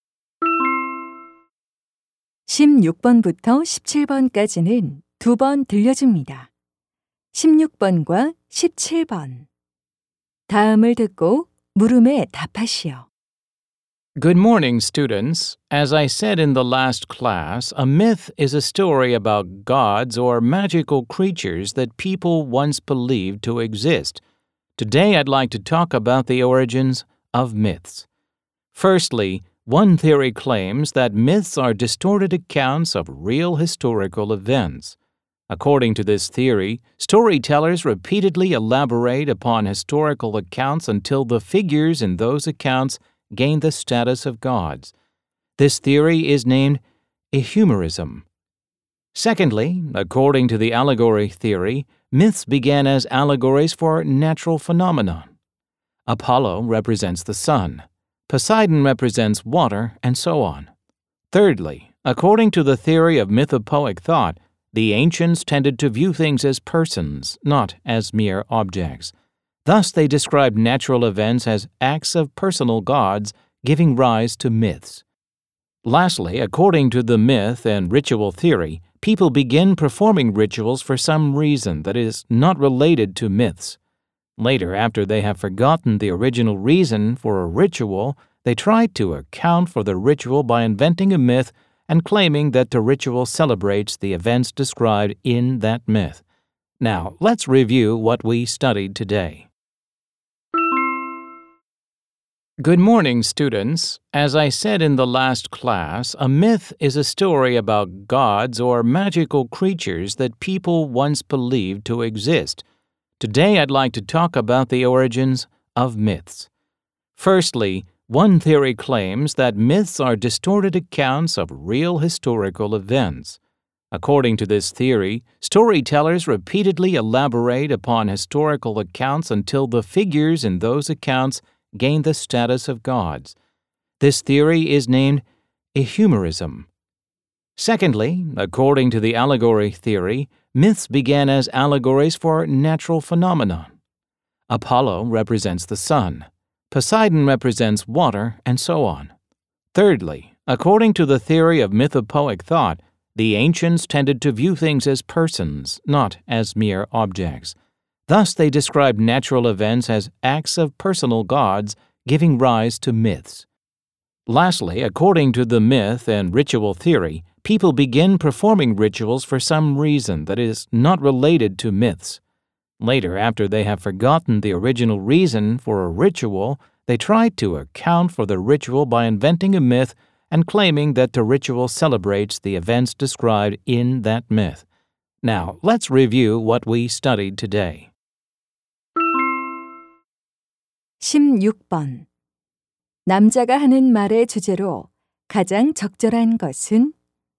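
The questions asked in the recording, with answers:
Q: 남자가 하는 말의 주제로 가장 적절한 것은?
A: 신화의 기원에 관한 이론들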